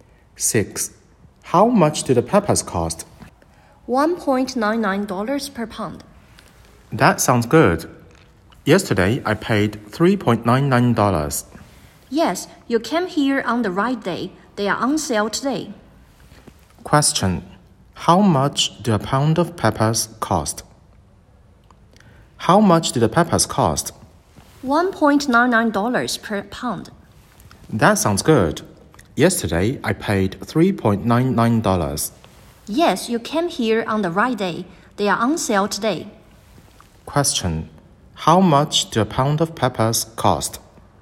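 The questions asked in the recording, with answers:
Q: How much did a pound of peppers cost?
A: $1.99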